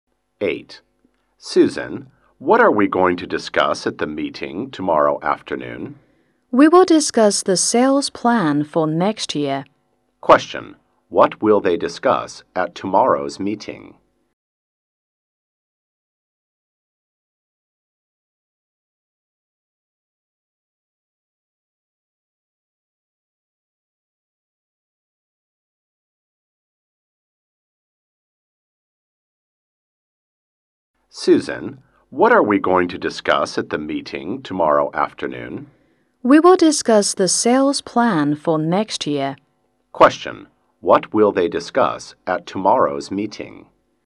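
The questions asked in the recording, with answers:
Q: Question. What will they discuss at tomorrow's meeting?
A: The sales plan for next year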